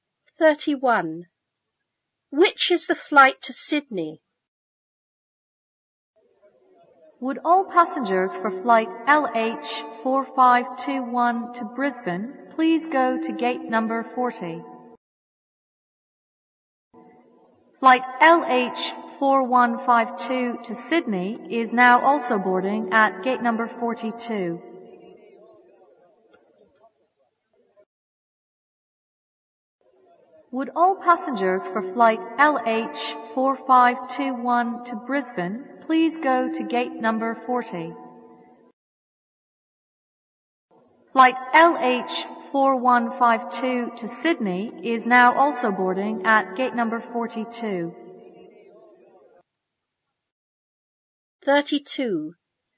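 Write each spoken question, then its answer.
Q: Which is the flight to Sydney?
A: Flight LH4152, boarding at gate 42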